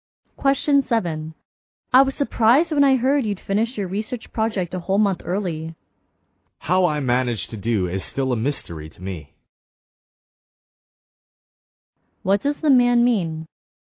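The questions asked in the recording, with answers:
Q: What does the man mean?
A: He doesn't know how he managed to finish so early.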